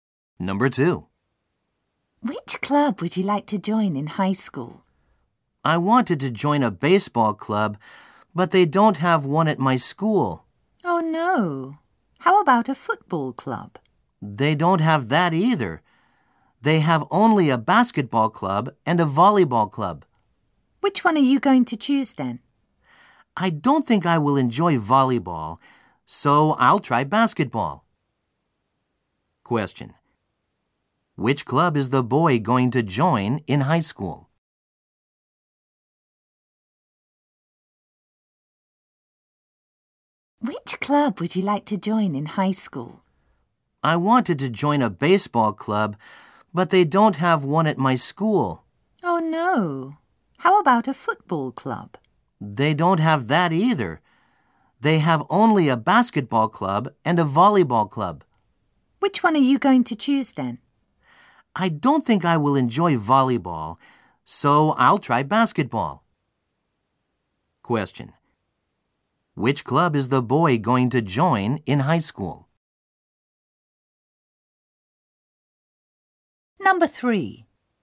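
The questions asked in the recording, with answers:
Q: Which club is the boy going to join in high school?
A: The basketball club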